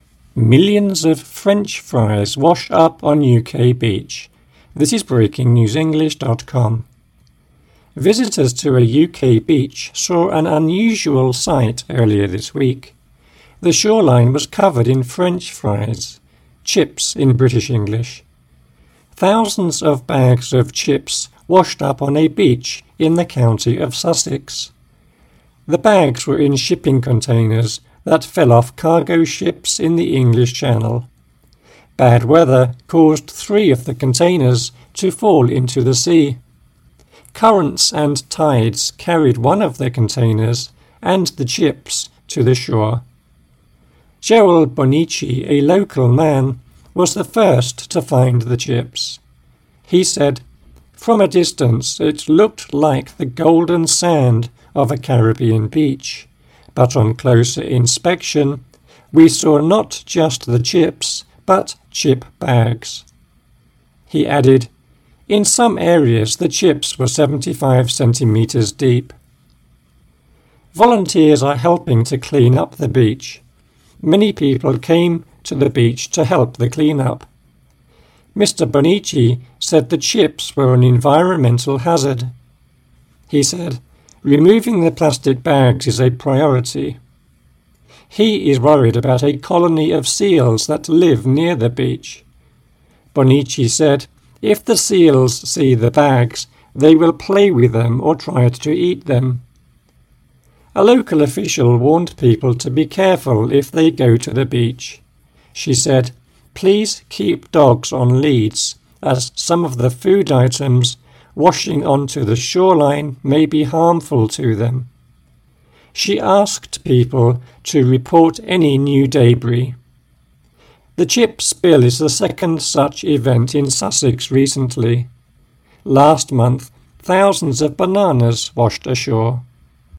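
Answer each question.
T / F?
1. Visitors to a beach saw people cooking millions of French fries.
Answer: F

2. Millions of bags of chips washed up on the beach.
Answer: F

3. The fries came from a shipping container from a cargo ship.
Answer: T

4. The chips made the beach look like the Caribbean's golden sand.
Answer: T

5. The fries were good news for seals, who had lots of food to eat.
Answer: F

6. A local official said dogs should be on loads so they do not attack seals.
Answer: F

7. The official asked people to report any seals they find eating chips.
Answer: F

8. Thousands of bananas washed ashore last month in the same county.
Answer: T

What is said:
(2/7) Millions of French fries wash up on UK beach
Visitors to a UK beach saw an unusual sight earlier this week. The shoreline was covered in French fries ("chips" in British English). Thousands of bags of chips washed up on a beach in the county of Sussex. 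The bags were in shipping containers that fell off cargo ships in the English Channel. Bad weather caused three of the containers to fall into the sea. Currents and tides carried one of the containers and the chips to the shore. Joel Bonnici, a local man, was the first to find the chips. He said: "From a distance, it looked like the golden sand of a Caribbean beach, but on closer inspection, we saw not just the chips, but chip bags." He added: "In some areas, the chips were 75 cm deep."
Volunteers are helping to clean up the beach. Many people came to the beach to help the clean-up. Mr Bonnici said the chips were an environmental hazard. He said: "Removing the plastic bags is a priority." He is worried about a colony of seals that live near the beach. Bonnici said: "If the seals see the bags, they will play with them or try to eat them." A local official warned people to be careful if they go to the beach. 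She said: "Please keep dogs on leads as some of the food items washing on to the shoreline may be harmful to them." She asked people to "report any new debris". The chip spill is the second such event in Sussex recently. Last month, thousands of bananas washed ashore.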